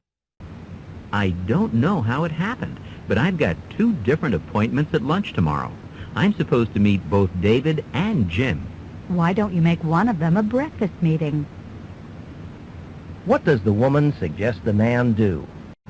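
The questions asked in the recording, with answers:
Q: What does the woman suggest the man do?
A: Schedule one of the meetings for breakfast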